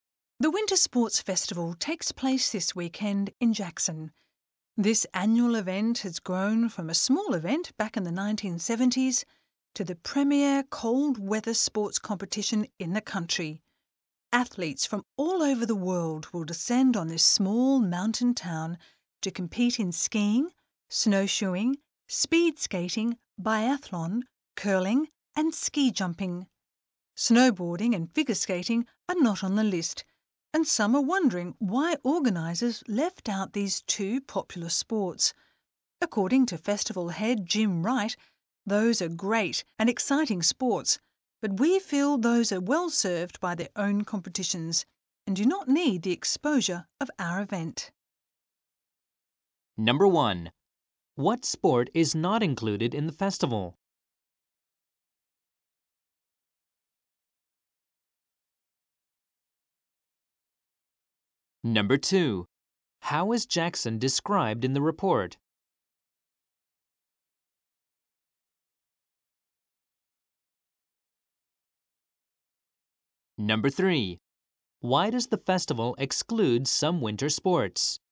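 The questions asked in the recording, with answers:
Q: What sport is not included in the festival?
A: Snowboarding (and figure skating)

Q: How is Jackson described in the report?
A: As a small mountain town

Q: Why does the festival exclude some winter sports?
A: Those sports are well served by their own competitions and don't need the festival's exposure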